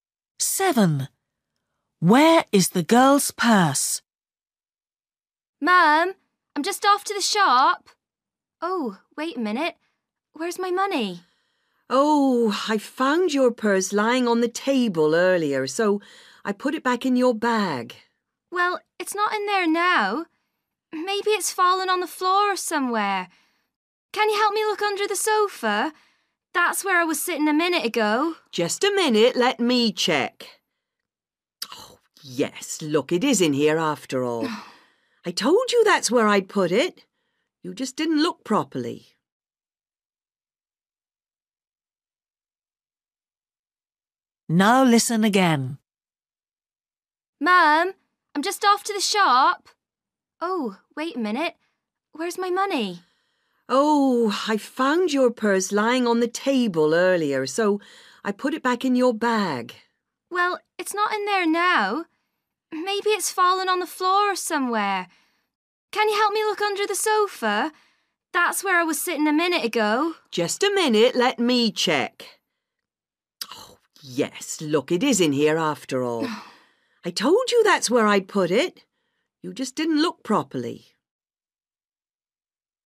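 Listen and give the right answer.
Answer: in her bag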